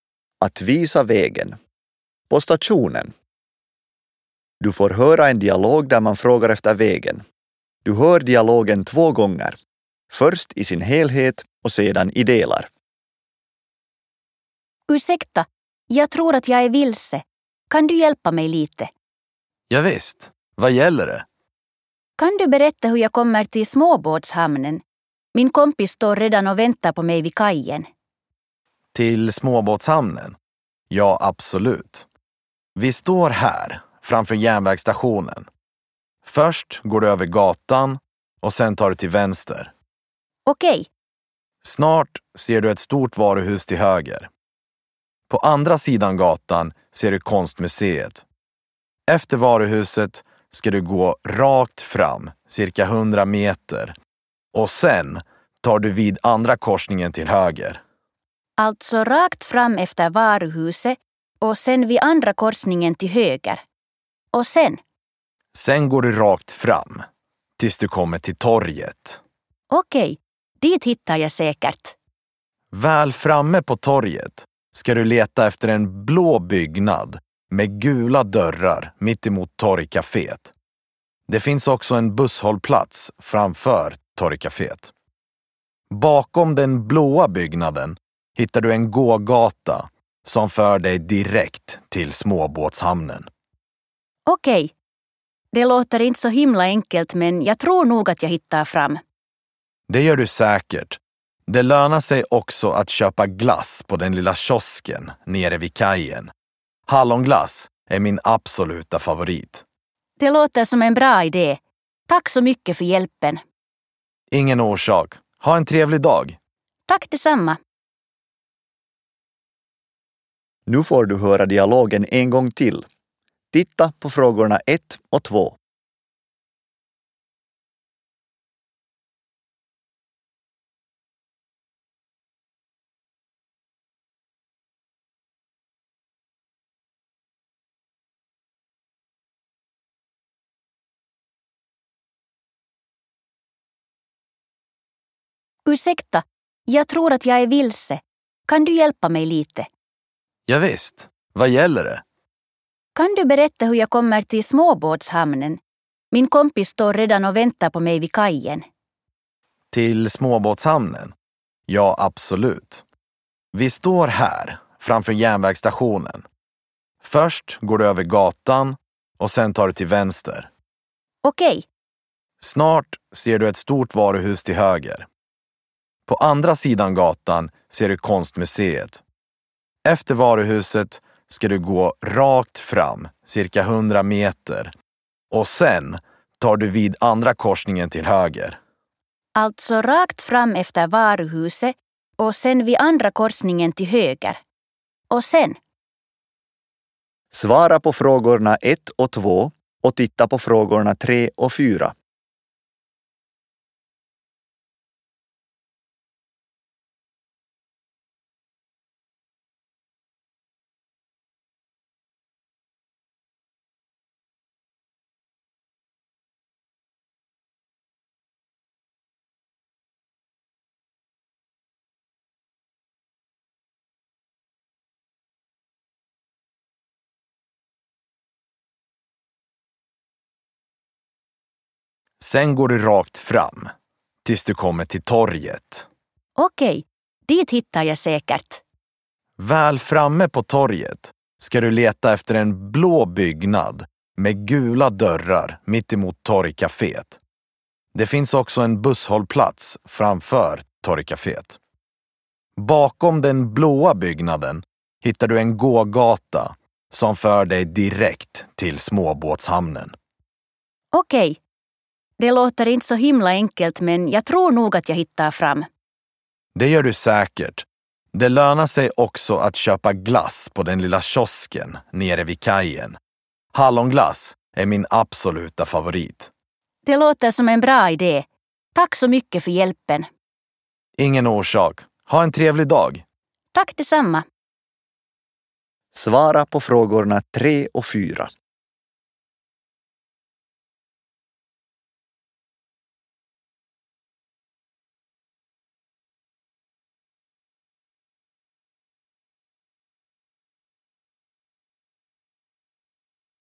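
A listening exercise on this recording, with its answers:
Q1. Minne Erika on menossa?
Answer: satamaan

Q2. Mitä Erikan pitää tehdä tavaratalon jälkeen?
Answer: Hänen pitää mennä suoraan eteenpäin

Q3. Minkä vinkin Erika saa lopussa?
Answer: Satamassa kannattaa herkutella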